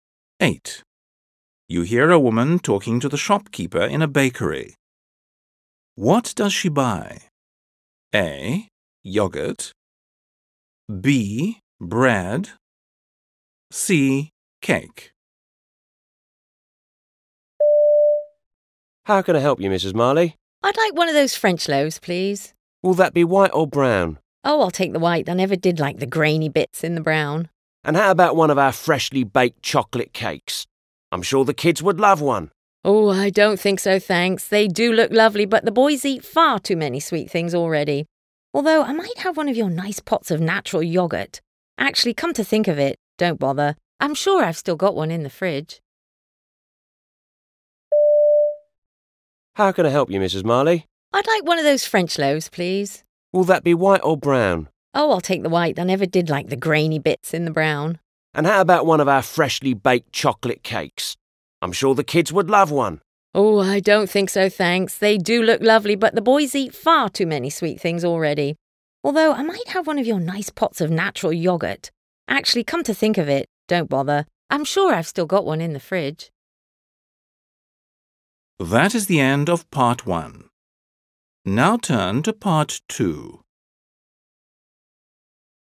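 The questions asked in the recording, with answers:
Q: What does she buy?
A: B: Bread.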